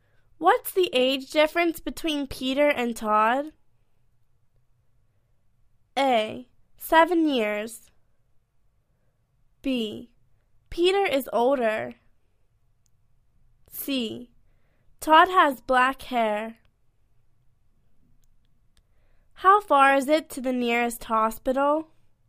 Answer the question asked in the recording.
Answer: Seven years